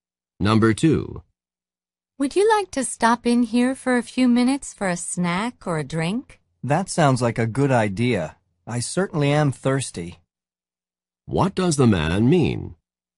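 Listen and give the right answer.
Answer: He would like to stop for a drink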